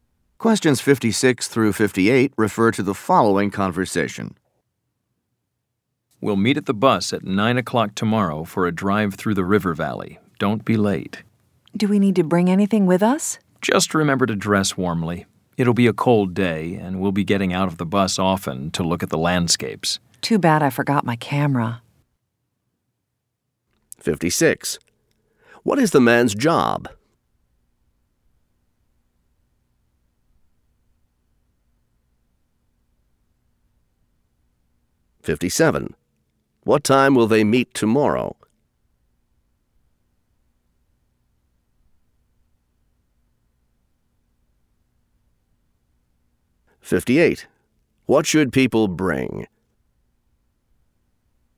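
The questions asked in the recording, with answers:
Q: What time will they meet tomorrow?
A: 9 o'clock

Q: What should people bring?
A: Warm clothes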